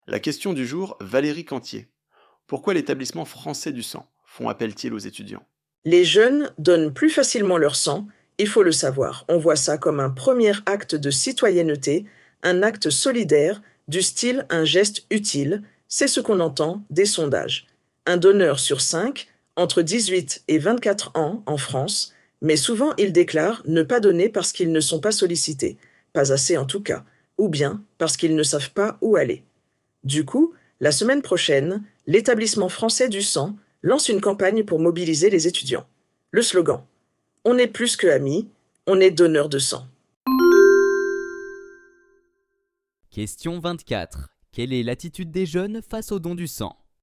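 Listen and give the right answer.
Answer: Ils sont favorables au don du sang mais ne donnent pas car ils ne sont pas assez sollicités ou ne savent pas où aller.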